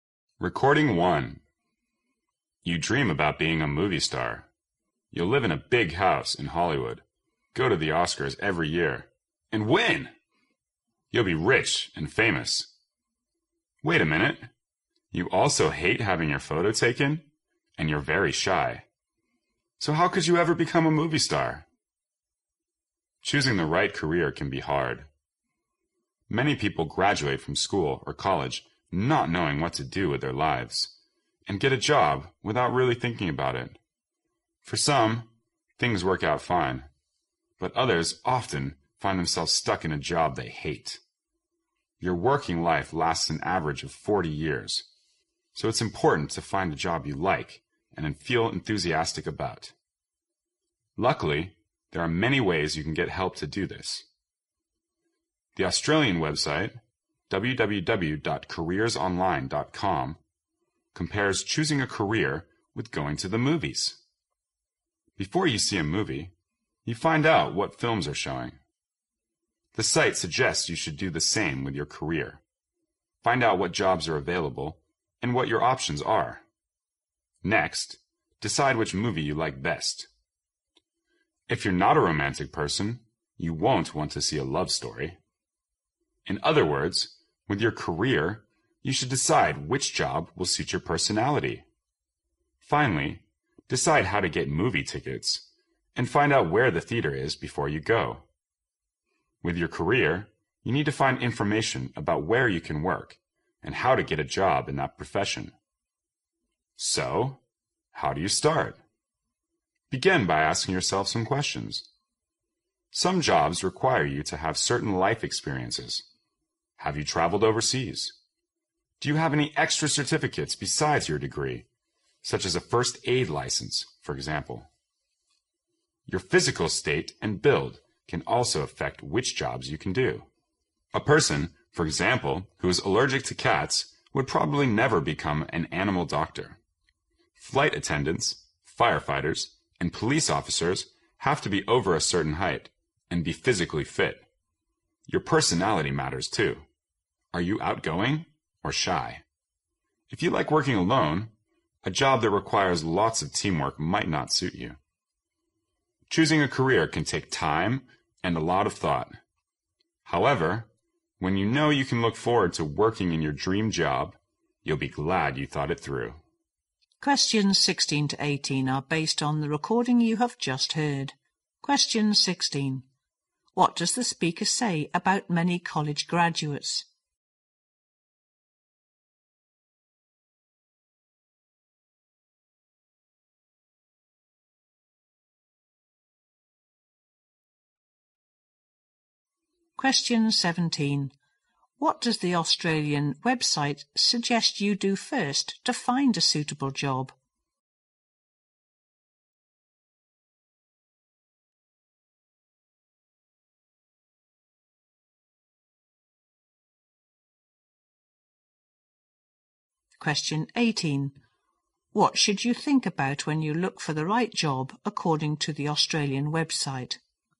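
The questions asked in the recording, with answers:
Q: What does the speaker say about many college graduates?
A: They don't know what to do with their lives and take a job without really thinking about it

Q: What does the Australian website suggest you do first to find a suitable job?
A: Find out what jobs are available and what your options are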